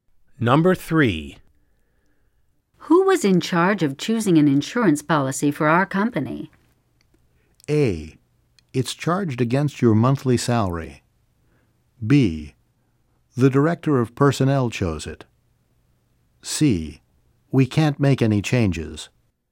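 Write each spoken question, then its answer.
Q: Who was in charge of choosing an insurance policy for our company?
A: B: The director of personnel chose it.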